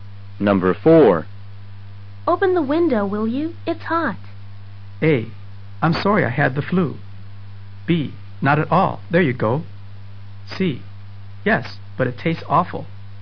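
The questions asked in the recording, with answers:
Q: Open the window, will you?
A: B: Not at all. There you go.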